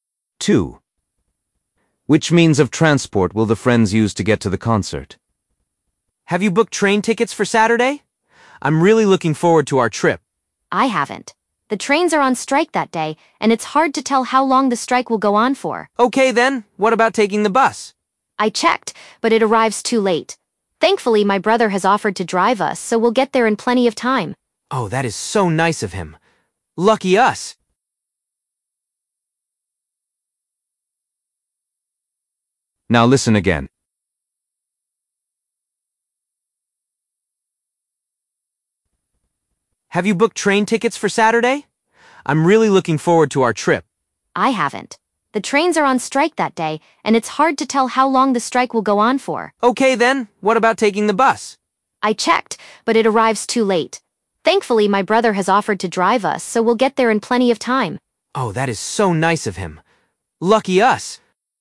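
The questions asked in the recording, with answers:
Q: Which means of transport will the friends use to get to the concert?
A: car (her brother drives them)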